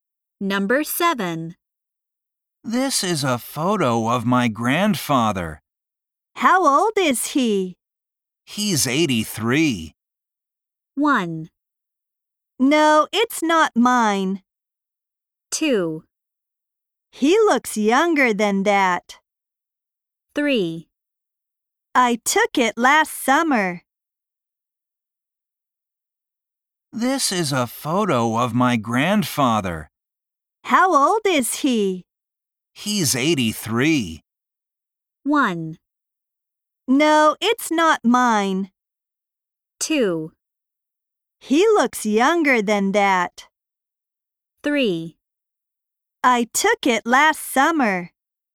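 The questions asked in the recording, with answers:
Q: He's 83.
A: 2: He looks younger than that.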